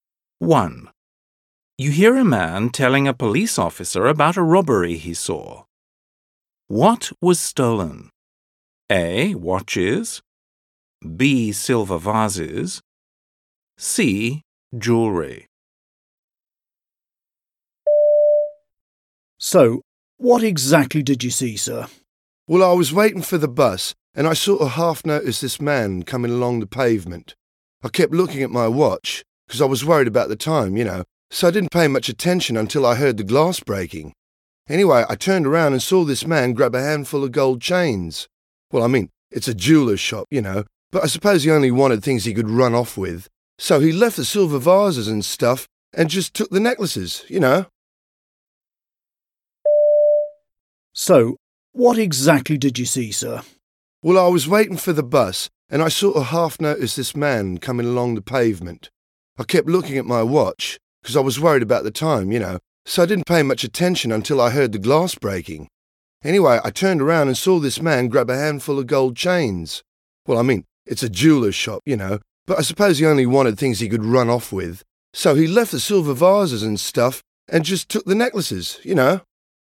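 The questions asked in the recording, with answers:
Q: What was stolen? A. Watches. B. Silver vases. C. Jewelry.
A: C: Jewelry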